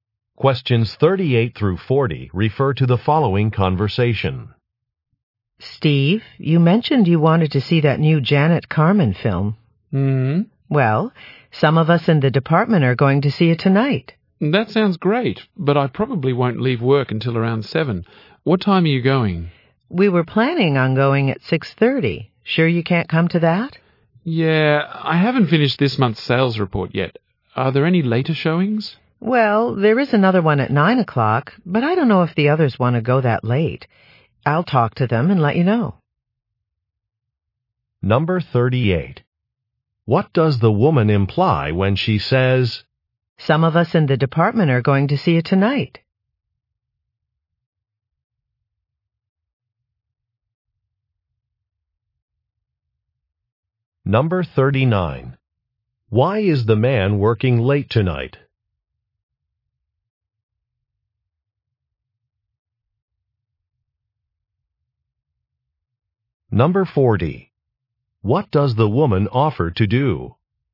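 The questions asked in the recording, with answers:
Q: What does the woman imply when she says,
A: She is inviting the man to come to the film

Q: Why is the man working late tonight?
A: He hasn't finished the monthly sales report

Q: What does the woman offer to do?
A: Talk to the others about a later showing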